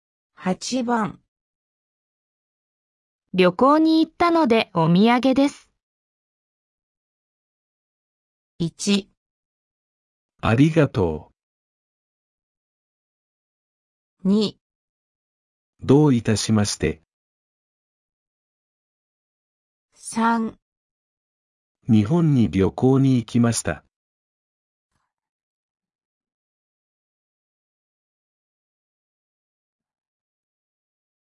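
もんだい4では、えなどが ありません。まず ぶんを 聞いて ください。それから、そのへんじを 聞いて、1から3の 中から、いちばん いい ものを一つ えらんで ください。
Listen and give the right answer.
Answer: 1

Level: N4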